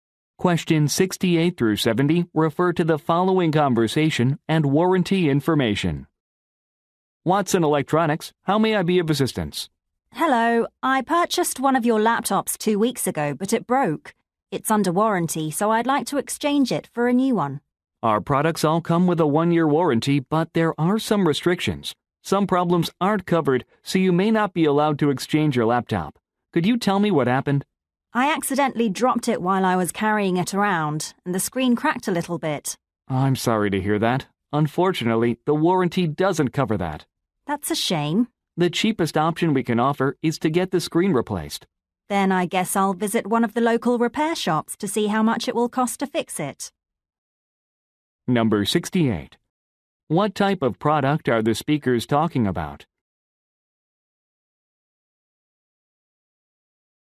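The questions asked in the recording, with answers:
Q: What type of product are the speakers talking about?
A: A laptop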